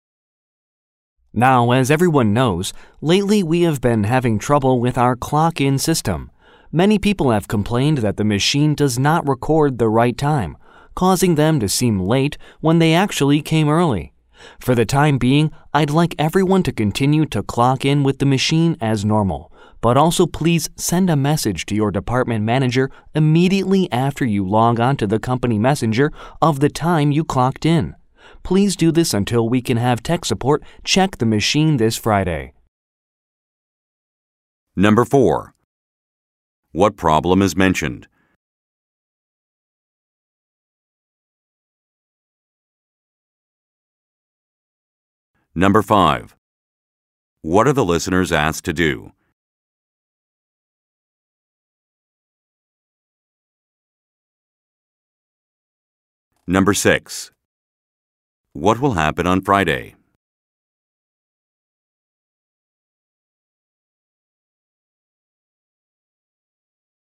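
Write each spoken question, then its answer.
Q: What problem is mentioned?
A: The clock-in machine does not record the right time

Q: What are the listeners asked to do?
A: Send their department manager a message with the time they clocked in

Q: What will happen on Friday?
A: Tech support will check the machine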